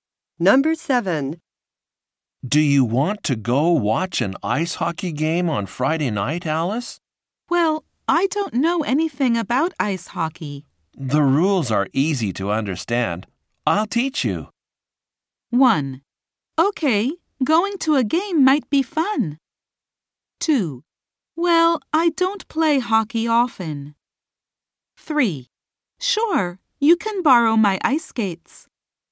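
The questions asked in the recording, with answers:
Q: I'll teach you.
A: 1: Okay, going to a game might be fun.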